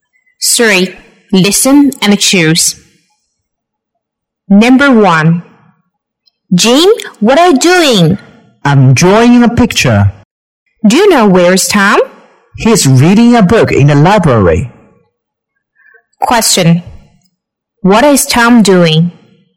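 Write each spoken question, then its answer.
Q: What is Tom doing?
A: He's reading a book in the library.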